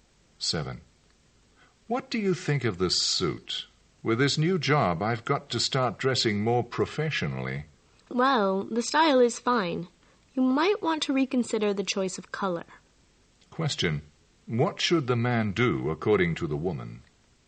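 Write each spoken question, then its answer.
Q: What should the man do according to the woman?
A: Choose a suit in a different color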